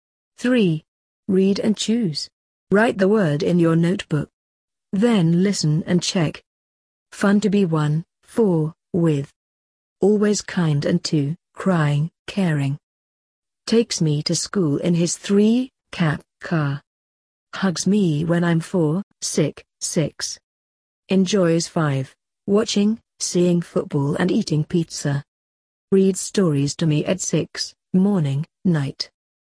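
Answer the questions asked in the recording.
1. with
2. caring
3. car
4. sick
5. watching
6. night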